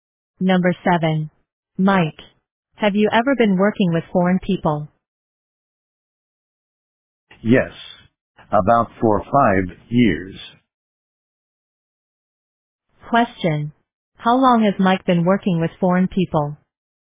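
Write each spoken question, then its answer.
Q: Question, how long has Mike been working with foreign people?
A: About 4 or 5 years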